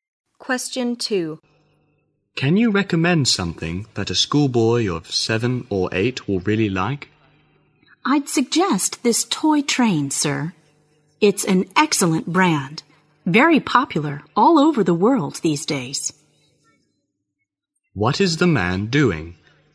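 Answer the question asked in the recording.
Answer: Buying a toy for a young boy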